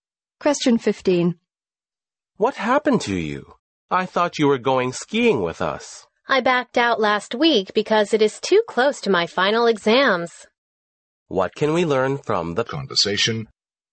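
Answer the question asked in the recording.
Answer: The man decided not to go skiing because it was too close to his final exams.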